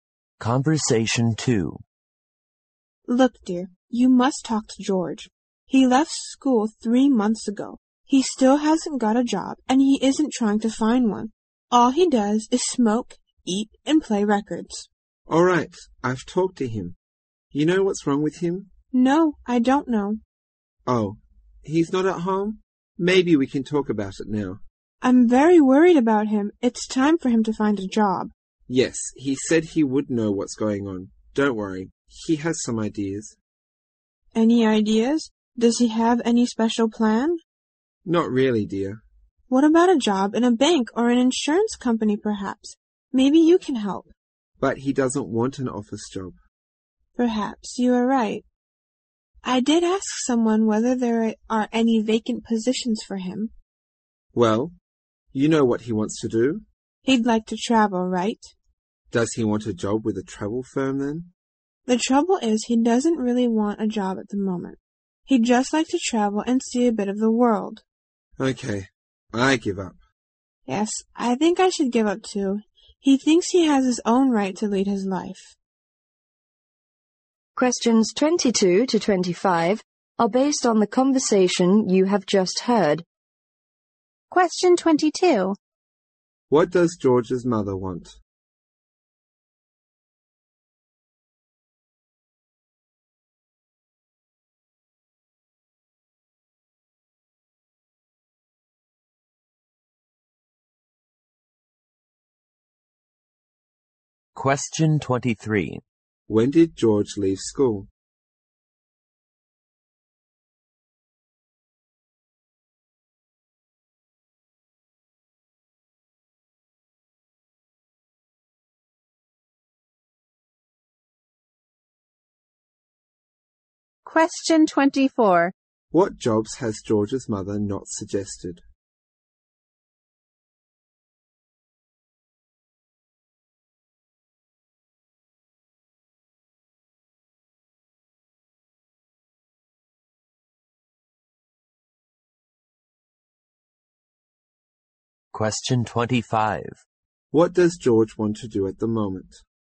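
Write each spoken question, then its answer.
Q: What does George's mother want?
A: She wants George to find a job

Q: When did George leave school?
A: Three months ago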